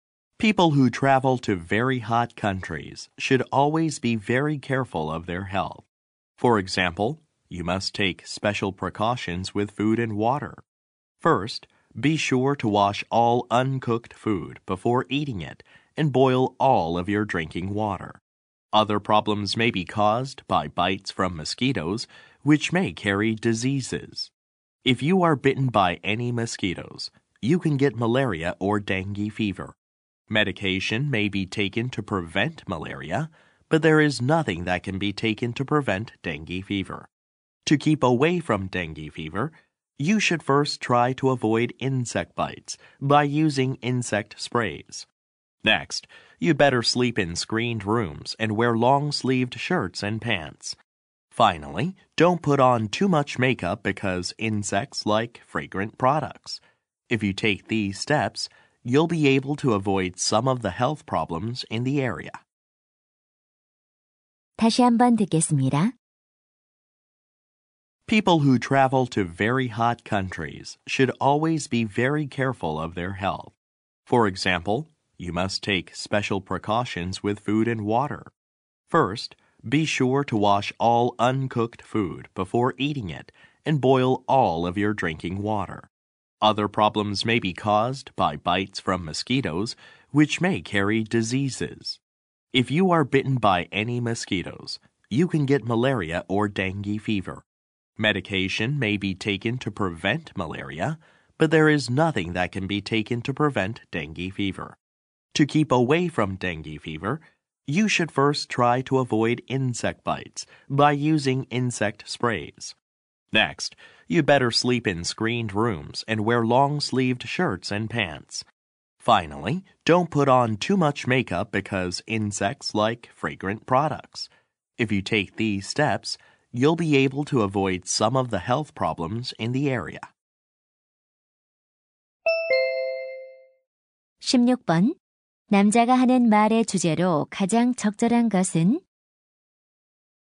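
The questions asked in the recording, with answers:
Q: 남자가 하는 말의 주제로 가장 적절한 것은?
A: 더운 나라를 여행할 때 건강을 지키기 위한 주의 사항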